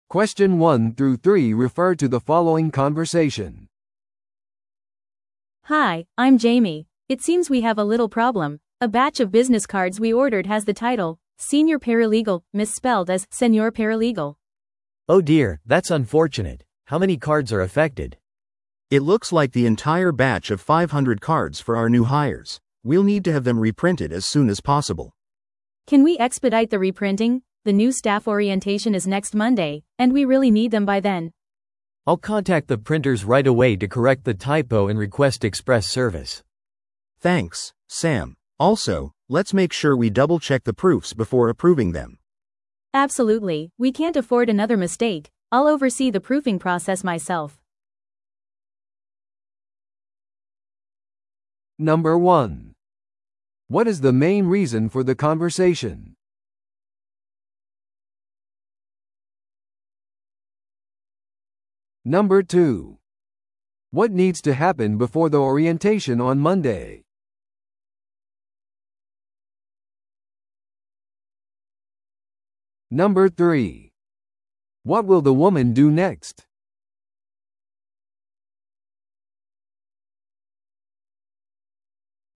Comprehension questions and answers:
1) What is the main reason for the conversation?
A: 名刺に誤植があります。

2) What needs to happen before the orientation on Monday?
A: 名刺の一括注文を再印刷する必要があります。

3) What will the woman do next?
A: 新しいカードの校正プロセスを監督する。

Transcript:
A: Hi, I'm Jamie. It seems we have a little problem. A batch of business cards we ordered has the title 'Senior Paralegal' misspelled as 'Senor Paralegal'.
B: Oh dear, that's unfortunate. How many cards are affected?
C: It looks like the entire batch of 500 cards for our new hires. We'll need to have them reprinted as soon as possible.
A: Can we expedite the reprinting? The new staff orientation is next Monday, and we really need them by then.
B: I'll contact the printers right away to correct the typo and request express service.
C: Thanks, Sam. Also, let's make sure we double-check the proofs before approving them.
A: Absolutely, we can't afford another mistake. I'll oversee the proofing process myself.